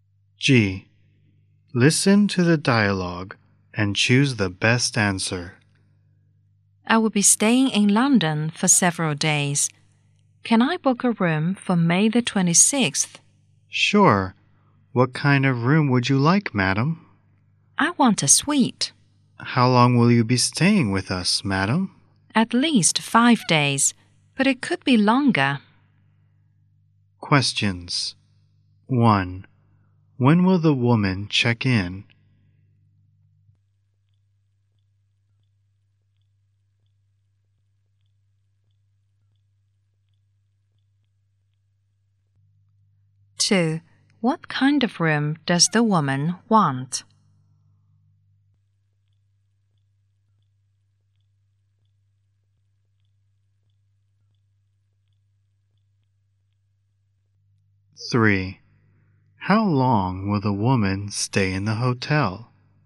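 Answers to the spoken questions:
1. May the 26th
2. A suite
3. At least 5 days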